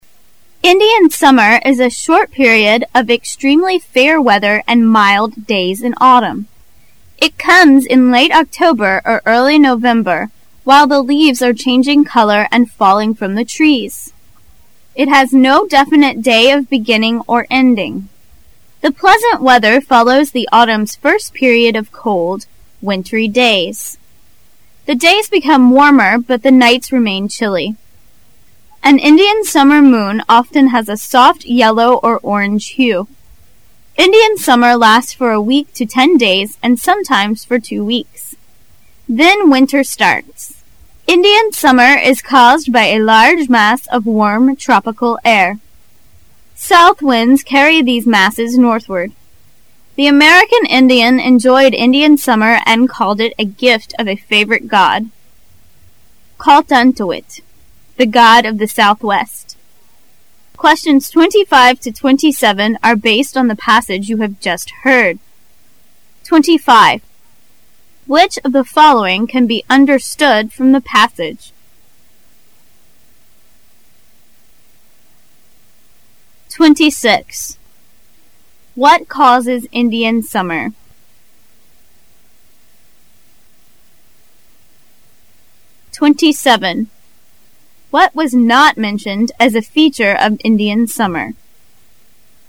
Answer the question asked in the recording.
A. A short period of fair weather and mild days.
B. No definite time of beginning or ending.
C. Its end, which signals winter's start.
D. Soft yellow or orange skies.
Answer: D. Soft yellow or orange skies.

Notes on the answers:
What was NOT mentioned as a feature of Indian summer? [试题分析]本题考查对具体细节的辨识判断。 [详细解答]文中谈到Indian Summer is a short period of extremely fair weather and mild days in autumn.故A 正确。后又谈到It has no definite day of beginning or ending.故B也正确。从文中可知C也正确,故只有 D项不能从原文中证实。

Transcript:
[解析] 25-27 Indian summer is a short period of extremely fair weather and mild days in autumn. It comes in late October or early November while the leaves are changing color and failing from the trees. It has no definite day of beginning or ending. The pleasant weather follows the autumn's first period of cold, wintry days. The days become warmer but the nights remain chilly. An Indian summer moon often has a soft yellow or orange hue. Indian summer lasts from a week to ten days and sometimes for two weeks. Then winter starts. Indian summer is caused by a large mass of warm tropical air.
C.A large mass of warm tropical air carried northward.
[详细解答]文中谈到Indian summer is caused by a large mass of warm tropical air.South winds carry these masses northward,故应选C。
Passage 2 Questions 28 to 30 are based on the passage you have just heard: